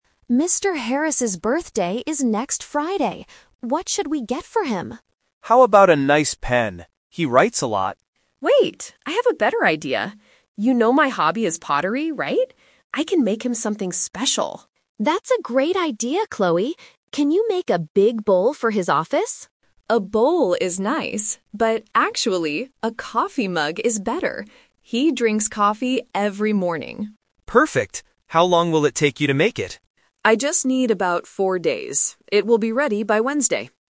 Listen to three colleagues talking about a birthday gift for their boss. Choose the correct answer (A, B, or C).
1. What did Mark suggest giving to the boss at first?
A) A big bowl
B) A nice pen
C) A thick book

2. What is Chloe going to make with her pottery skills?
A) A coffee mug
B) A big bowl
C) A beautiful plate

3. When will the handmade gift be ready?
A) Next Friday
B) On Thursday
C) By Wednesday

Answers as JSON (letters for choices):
{"1": "B", "2": "A", "3": "C"}

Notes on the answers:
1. Mark clearly suggests his idea at the beginning: "How about a nice pen?"
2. Chloe decides to make a mug because "He drinks coffee every morning."
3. Chloe says it takes four days and confirms: "It will be ready by Wednesday."

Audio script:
Linda: Mr. Harris's birthday is next Friday. What should we get for him?
Mark: How about a nice pen? He writes a lot.
Chloe: Wait, I have a better idea. You know my hobby is pottery, right? I can make him something special.
Linda: That's a great idea, Chloe! Can you make a big bowl for his office?
Chloe: A bowl is nice, but actually, a coffee mug is better. He drinks coffee every morning.
Mark: Perfect! How long will it take you to make it?
Chloe: I just need about four days. It will be ready by Wednesday.